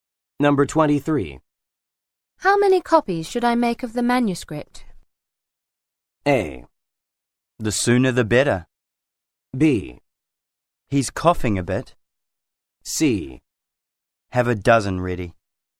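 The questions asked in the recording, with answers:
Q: How many copies should I make of the manuscript?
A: C: Have a dozen ready.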